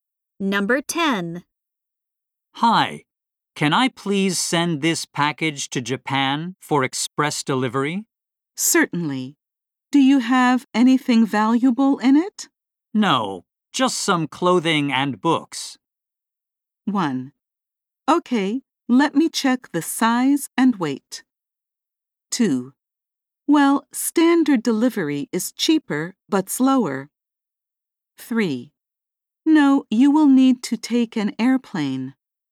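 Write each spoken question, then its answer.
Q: No, just some clothing and books.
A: 1: Okay, let me check the size and weight.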